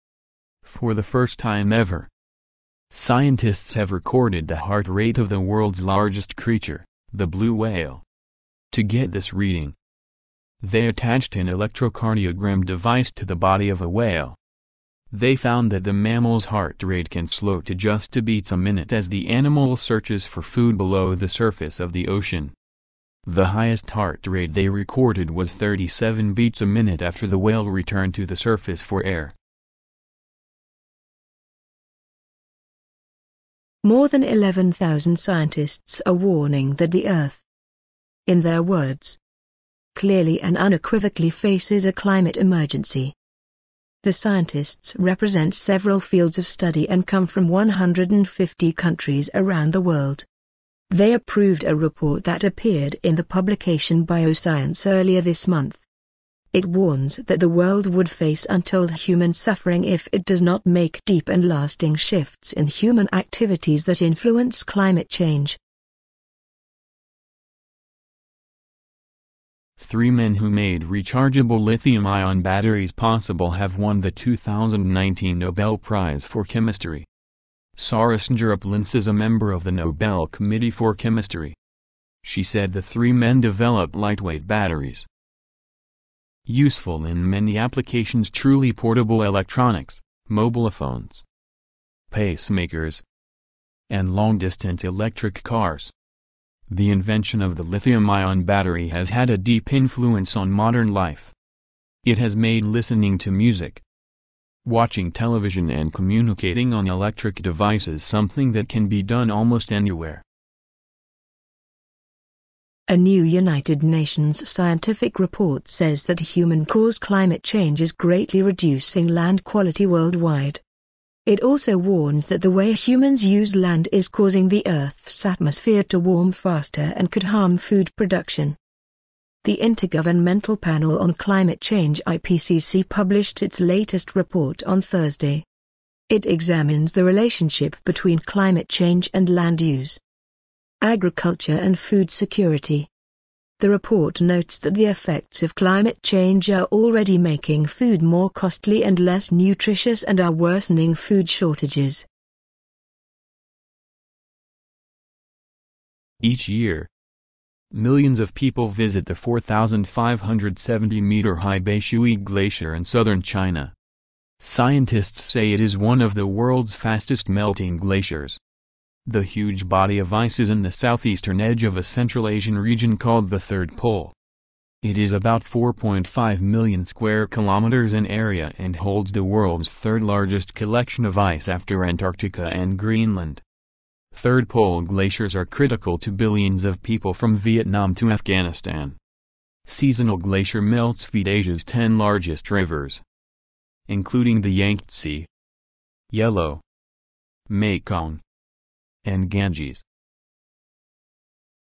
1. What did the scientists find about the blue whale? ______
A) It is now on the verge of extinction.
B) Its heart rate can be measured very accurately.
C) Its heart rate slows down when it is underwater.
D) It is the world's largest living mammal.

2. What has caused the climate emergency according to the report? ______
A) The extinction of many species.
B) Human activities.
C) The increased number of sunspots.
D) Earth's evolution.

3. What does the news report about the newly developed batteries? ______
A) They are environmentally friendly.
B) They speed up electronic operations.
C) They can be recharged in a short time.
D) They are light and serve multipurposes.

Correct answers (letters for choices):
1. C
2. B
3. D